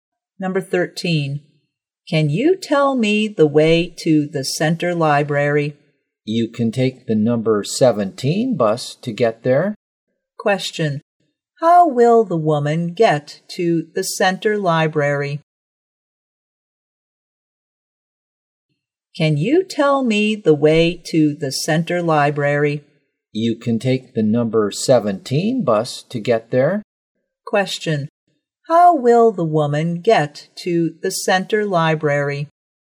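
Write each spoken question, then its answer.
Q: How will the woman get to the center library?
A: By the number 17 bus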